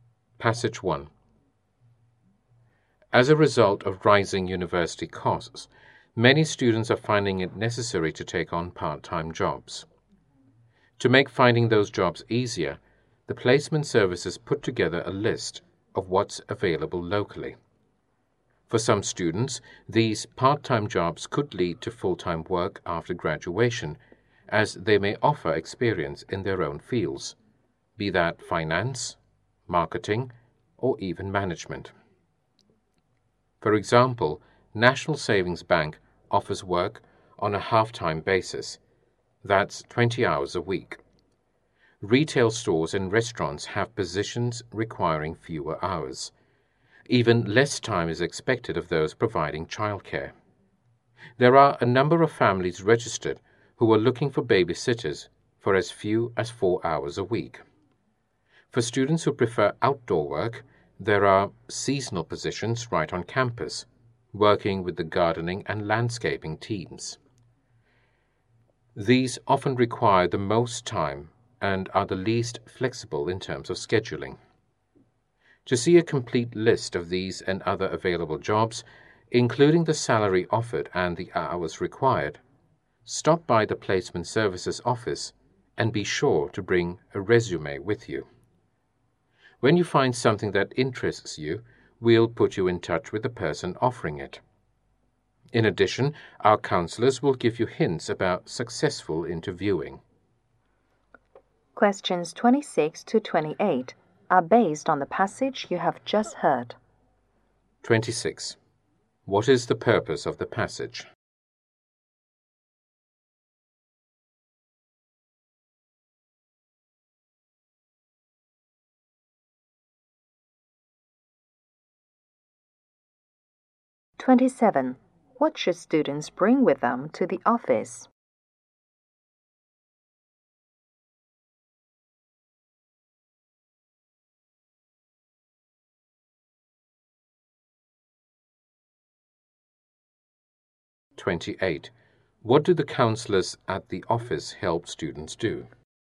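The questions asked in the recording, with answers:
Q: What is the purpose of the passage?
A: To inform students about available part-time jobs

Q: What should students bring with them to the office?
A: A resume

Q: What do the counselors at the office help students do?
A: Interview successfully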